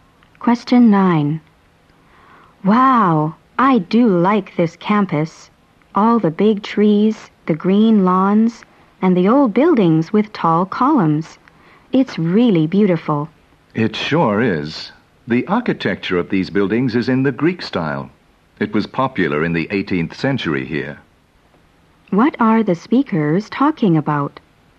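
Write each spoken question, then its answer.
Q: What are the speakers talking about?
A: The campus and the Greek style of its buildings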